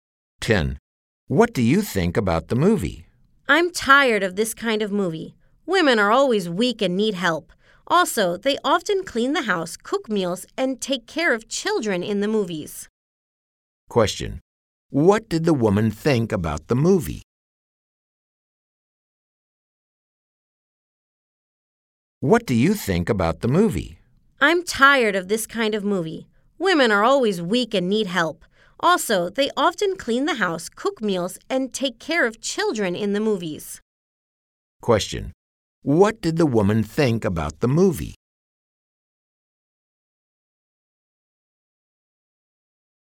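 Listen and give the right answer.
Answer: She was tired of it because it showed women in stereotyped roles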